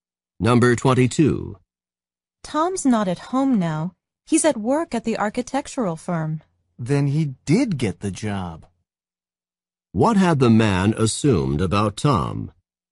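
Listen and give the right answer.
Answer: That he had not gotten the job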